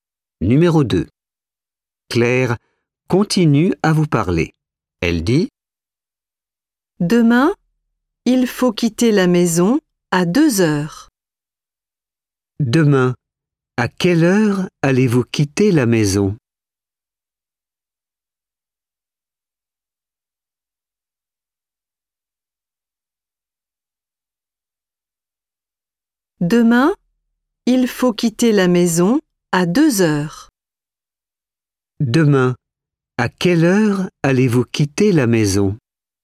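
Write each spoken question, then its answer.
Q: Demain, à quelle heure allez-vous quitter la maison?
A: À 2 heures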